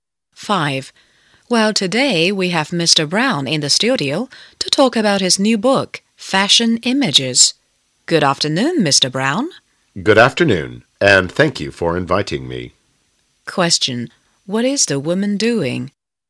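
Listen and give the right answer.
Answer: Interviewing Mr. Brown on a program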